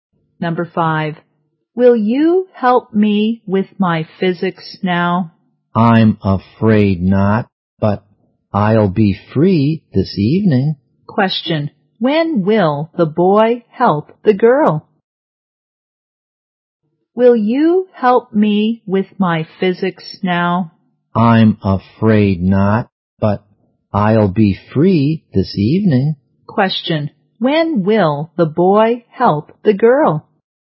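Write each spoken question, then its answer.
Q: when will the boy help the girl?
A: This evening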